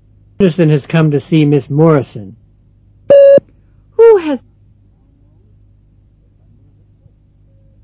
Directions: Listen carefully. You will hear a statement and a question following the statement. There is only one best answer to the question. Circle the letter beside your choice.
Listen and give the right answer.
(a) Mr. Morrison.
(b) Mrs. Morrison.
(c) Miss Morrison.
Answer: (c) Miss Morrison.

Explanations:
Mr. Anderson has come to see Miss Morrison.